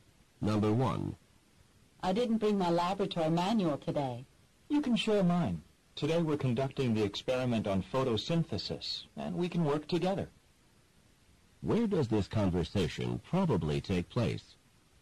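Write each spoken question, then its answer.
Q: Where does this conversation probably take place?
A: In a laboratory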